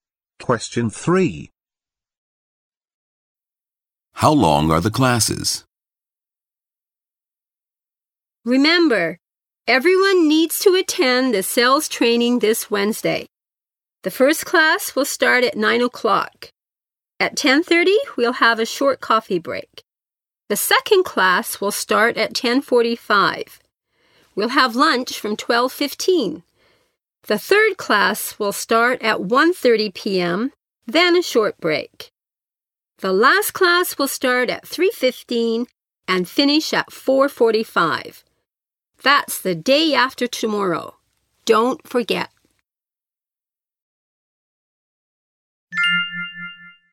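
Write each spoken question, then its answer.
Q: How long are the classes?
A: An hour and a half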